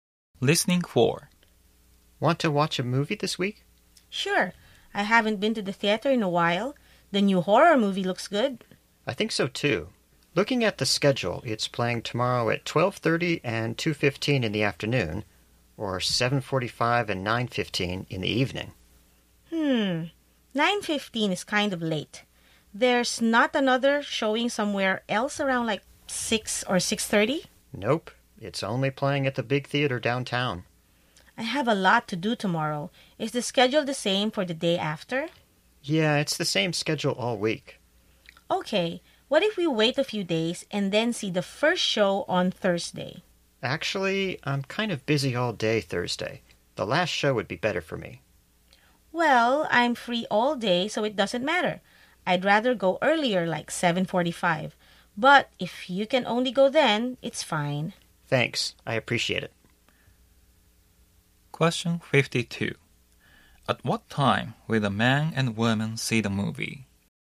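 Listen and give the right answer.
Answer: 9:15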